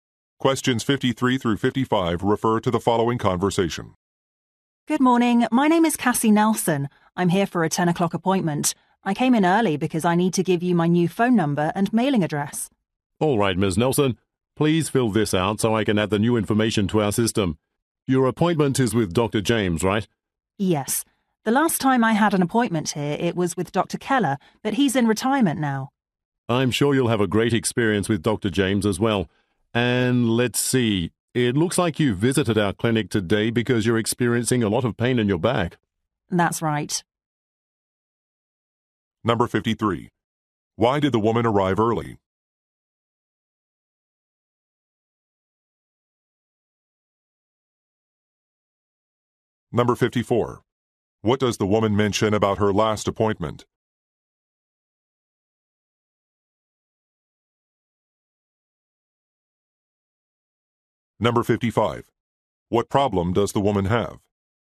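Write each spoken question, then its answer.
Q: Why did the woman arrive early?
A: To give her new phone number and address

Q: What does the woman mention about her last appointment?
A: It was with Dr. Keller, who has retired

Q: What problem does the woman have?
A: Back pain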